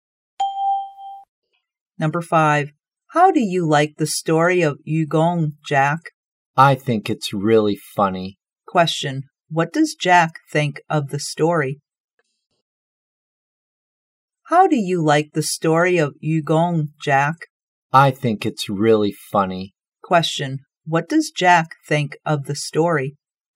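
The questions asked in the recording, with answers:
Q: what does Jack think of the story?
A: Really funny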